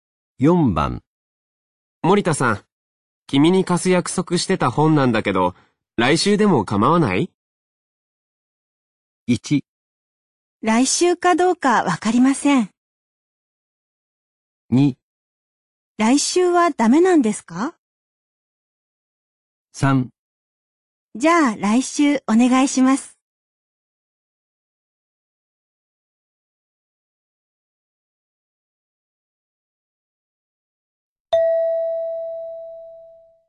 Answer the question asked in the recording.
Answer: 3

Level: N3 Listening · Test 12